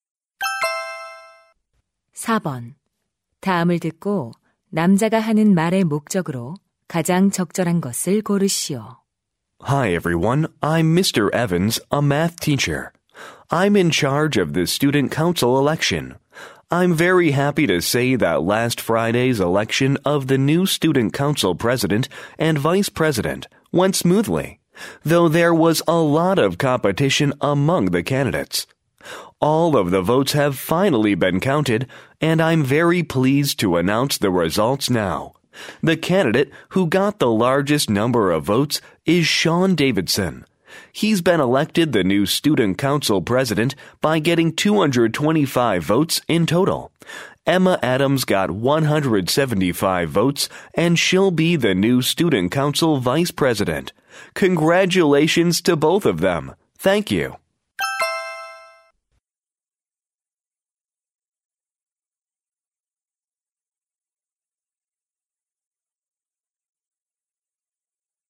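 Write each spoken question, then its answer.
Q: 다음을 듣고 남자가 하는 말의 목적으로 가장 적절한 것을 고르시오.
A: 학생회 선거 결과를 발표하려고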